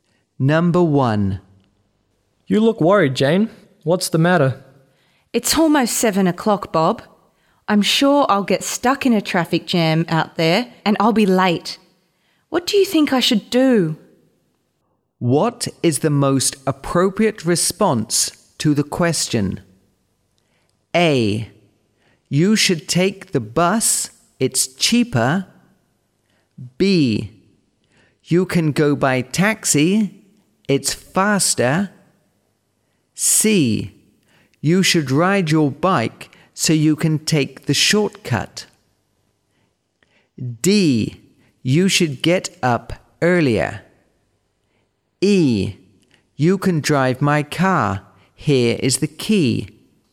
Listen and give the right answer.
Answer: C. You should ride your bike so you can take the shortcut.